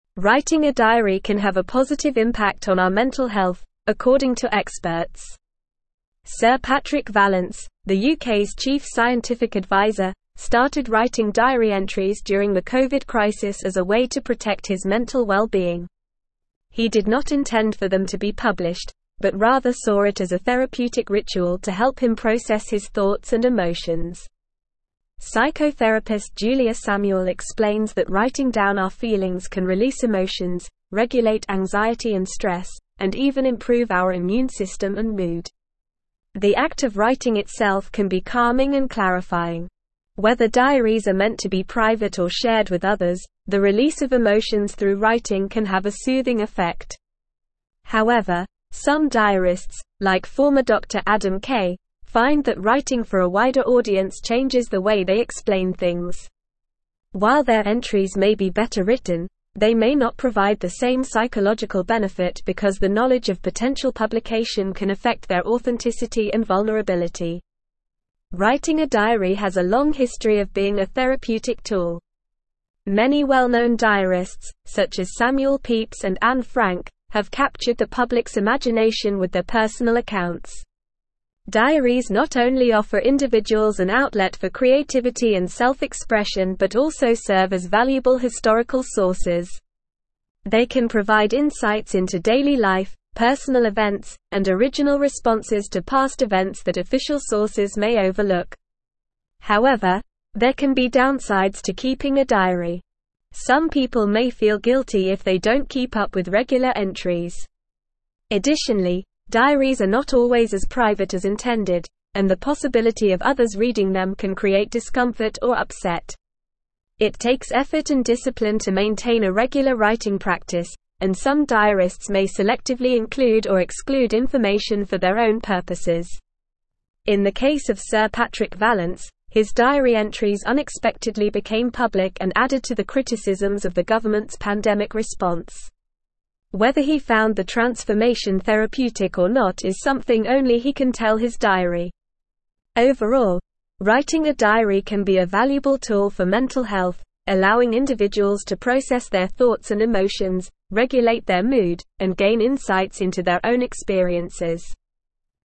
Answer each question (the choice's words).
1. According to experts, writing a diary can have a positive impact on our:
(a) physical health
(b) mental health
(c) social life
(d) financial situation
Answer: mental health

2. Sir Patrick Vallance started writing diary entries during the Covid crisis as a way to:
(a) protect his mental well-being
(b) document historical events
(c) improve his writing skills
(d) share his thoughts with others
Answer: protect his mental well-being

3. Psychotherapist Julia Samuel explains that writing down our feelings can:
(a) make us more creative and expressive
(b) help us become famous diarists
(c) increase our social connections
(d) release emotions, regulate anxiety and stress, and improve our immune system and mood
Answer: release emotions, regulate anxiety and stress, and improve our immune system and mood

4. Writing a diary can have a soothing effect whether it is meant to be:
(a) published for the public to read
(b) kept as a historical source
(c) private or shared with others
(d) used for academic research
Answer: private or shared with others

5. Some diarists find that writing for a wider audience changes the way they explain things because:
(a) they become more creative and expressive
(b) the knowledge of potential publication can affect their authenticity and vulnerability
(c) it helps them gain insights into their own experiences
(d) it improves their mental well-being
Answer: the knowledge of potential publication can affect their authenticity and vulnerability

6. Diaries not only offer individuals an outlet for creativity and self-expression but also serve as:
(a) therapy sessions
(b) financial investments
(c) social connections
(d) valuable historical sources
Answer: valuable historical sources

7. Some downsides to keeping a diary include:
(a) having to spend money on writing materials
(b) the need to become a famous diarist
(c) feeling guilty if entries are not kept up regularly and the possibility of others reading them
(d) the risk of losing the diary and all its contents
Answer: feeling guilty if entries are not kept up regularly and the possibility of others reading them

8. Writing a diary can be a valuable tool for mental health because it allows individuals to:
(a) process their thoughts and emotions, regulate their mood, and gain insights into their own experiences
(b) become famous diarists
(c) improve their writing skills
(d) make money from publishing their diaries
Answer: process their thoughts and emotions, regulate their mood, and gain insights into their own experiences

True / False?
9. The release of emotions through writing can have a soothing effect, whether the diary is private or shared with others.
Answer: True

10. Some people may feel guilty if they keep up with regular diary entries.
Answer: False

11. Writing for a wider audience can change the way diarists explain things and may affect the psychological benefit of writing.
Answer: True

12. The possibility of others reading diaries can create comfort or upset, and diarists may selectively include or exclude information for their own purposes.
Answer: False

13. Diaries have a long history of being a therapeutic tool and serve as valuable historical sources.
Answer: True

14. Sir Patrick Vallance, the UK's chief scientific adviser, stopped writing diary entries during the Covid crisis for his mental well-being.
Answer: False

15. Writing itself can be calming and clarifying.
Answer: True

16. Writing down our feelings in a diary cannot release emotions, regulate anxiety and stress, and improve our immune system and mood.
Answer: False

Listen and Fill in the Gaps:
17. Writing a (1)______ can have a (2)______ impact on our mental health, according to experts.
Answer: diary

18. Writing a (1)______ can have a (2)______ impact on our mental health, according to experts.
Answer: positive

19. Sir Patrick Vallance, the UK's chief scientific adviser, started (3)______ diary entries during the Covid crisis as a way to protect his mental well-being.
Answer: writing

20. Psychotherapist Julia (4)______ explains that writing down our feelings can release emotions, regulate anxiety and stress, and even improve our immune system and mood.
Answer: Samuel

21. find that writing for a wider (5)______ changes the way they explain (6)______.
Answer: audience

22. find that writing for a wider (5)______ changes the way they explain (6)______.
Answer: things

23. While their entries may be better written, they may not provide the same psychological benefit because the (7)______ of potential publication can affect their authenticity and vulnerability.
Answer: knowledge

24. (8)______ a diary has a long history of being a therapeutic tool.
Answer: Writing

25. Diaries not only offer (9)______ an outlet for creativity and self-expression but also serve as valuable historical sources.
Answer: individuals

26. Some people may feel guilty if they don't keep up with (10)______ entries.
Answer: regular

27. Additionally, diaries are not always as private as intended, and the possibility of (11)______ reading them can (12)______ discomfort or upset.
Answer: others

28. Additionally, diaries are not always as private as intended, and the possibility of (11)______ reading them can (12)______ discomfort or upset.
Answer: create

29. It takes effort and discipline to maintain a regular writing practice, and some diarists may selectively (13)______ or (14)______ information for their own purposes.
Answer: include

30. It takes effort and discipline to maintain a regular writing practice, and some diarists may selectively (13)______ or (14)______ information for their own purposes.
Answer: exclude

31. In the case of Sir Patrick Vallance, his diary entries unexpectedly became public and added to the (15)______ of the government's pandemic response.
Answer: criticisms

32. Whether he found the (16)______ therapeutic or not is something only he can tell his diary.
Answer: transformation

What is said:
Writing a diary can have a positive impact on our mental health, according to experts. Sir Patrick Vallance, the UK's chief scientific adviser, started writing diary entries during the Covid crisis as a way to protect his mental well-being. He did not intend for them to be published, but rather saw it as a therapeutic ritual to help him process his thoughts and emotions. Psychotherapist Julia Samuel explains that writing down our feelings can release emotions, regulate anxiety and stress, and even improve our immune system and mood. The act of writing itself can be calming and clarifying.
Whether diaries are meant to be private or shared with others, the release of emotions through writing can have a soothing effect. However, some diarists, like former doctor Adam Kay, find that writing for a wider audience changes the way they explain things. While their entries may be better written, they may not provide the same psychological benefit because the knowledge of potential publication can affect their authenticity and vulnerability.
Writing a diary has a long history of being a therapeutic tool. Many well-known diarists, such as Samuel Pepys and Anne Frank, have captured the public's imagination with their personal accounts. Diaries not only offer individuals an outlet for creativity and self-expression but also serve as valuable historical sources. They can provide insights into daily life, personal events, and original responses to past events that official sources may overlook.
However, there can be downsides to keeping a diary. Some people may feel guilty if they don't keep up with regular entries. Additionally, diaries are not always as private as intended, and the possibility of others reading them can create discomfort or upset. It takes effort and discipline to maintain a regular writing practice, and some diarists may selectively include or exclude information for their own purposes.
In the case of Sir Patrick Vallance, his diary entries unexpectedly became public and added to the criticisms of the government's pandemic response. Whether he found the transformation therapeutic or not is something only he can tell his diary. Overall, writing a diary can be a valuable tool for mental health, allowing individuals to process their thoughts and emotions, regulate their mood, and gain insights into their own experiences.

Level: Level 4